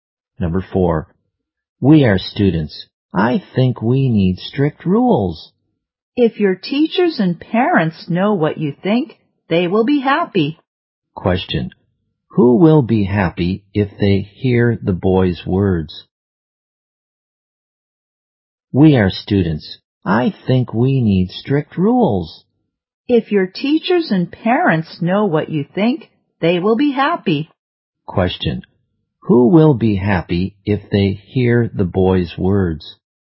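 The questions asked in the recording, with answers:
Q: Who will be happy if they hear the boy's words?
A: His teachers and parents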